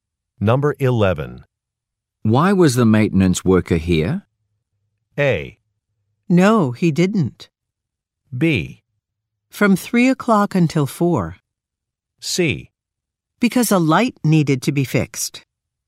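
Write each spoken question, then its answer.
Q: Why was the maintenance worker here?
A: C: Because a light needed to be fixed.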